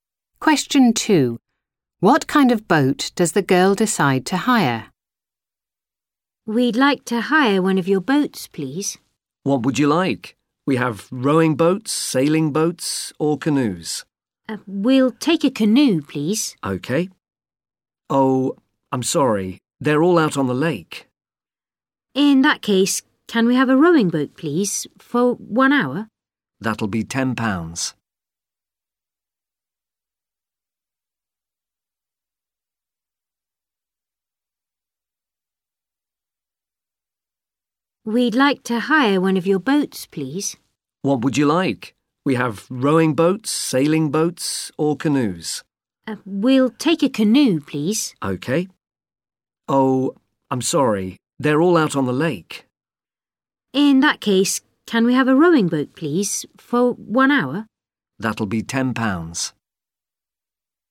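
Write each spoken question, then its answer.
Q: What kind of boat does the girl decide to hire?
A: a rowing boat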